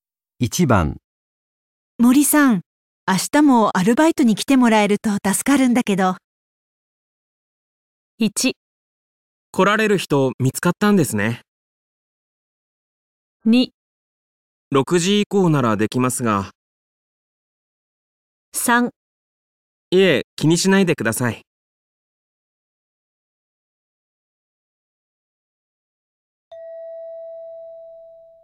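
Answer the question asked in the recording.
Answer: 2: 6時以降ならできますが。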